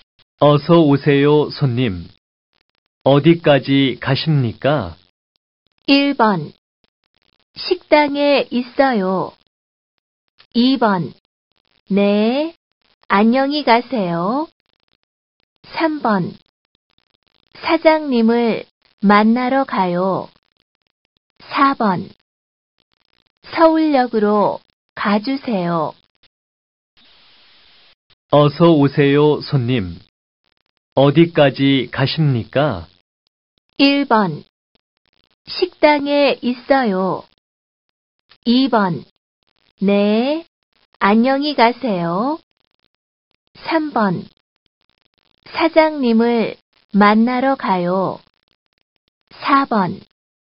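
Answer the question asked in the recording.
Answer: 4: 서울역으로 가주세요.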